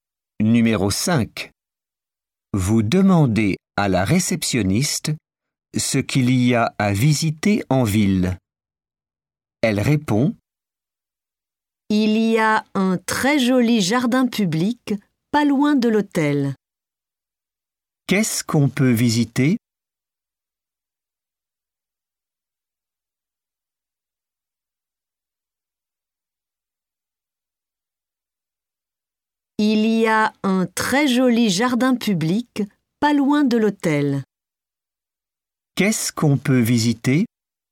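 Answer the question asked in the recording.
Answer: Un jardin public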